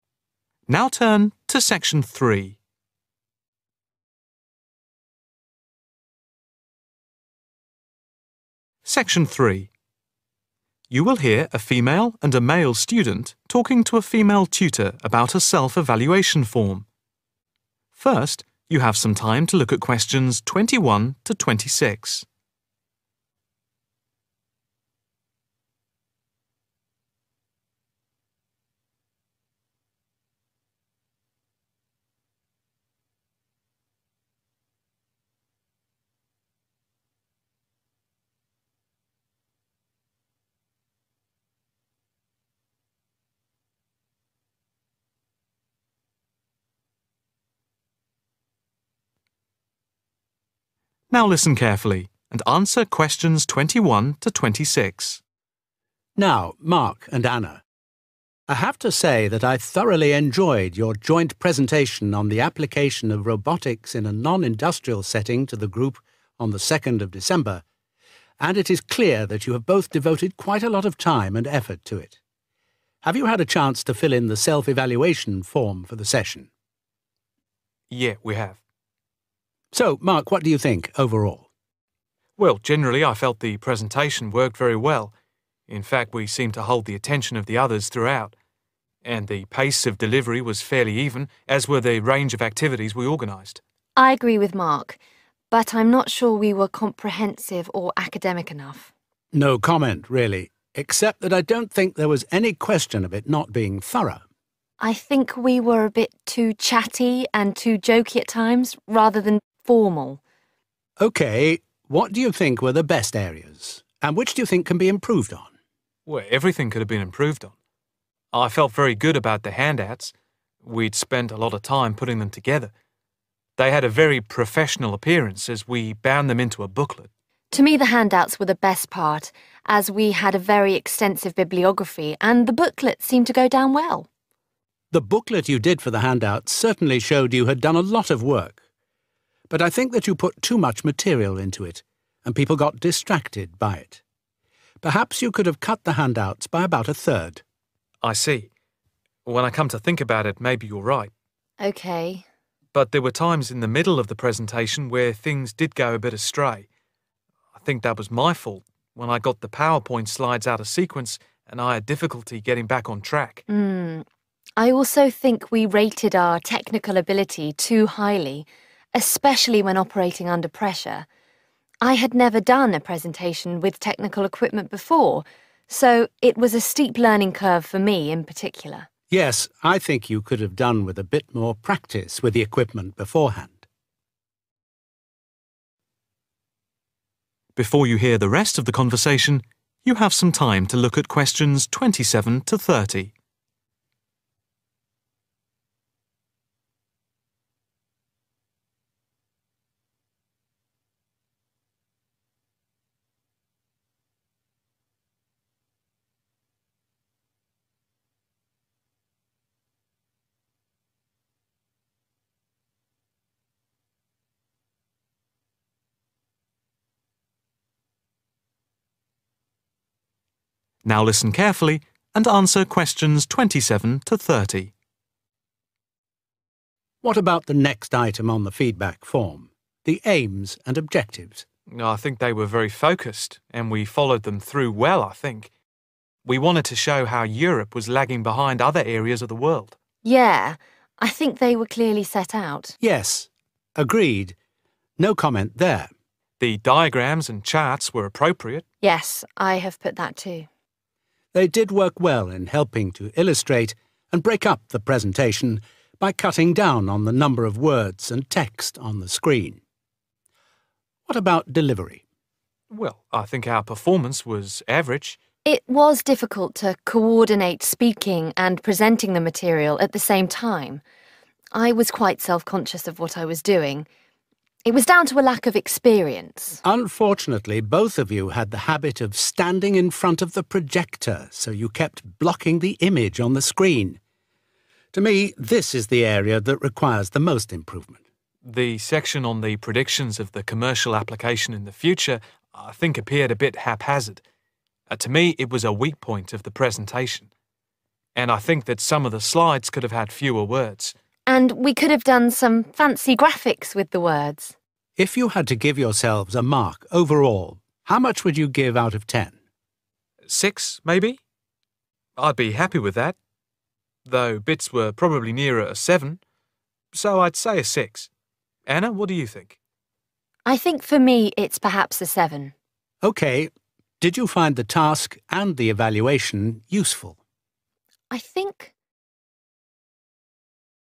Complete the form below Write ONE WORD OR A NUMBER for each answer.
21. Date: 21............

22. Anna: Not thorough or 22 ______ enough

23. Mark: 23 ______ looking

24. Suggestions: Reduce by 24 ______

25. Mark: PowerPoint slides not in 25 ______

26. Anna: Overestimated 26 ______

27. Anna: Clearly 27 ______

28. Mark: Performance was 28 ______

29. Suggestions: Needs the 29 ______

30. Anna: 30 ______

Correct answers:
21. 2nd December
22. Academic
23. Professional
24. About a third
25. Sequence
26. Technical ability
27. Set out
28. Average
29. Most improvement
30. 7/seven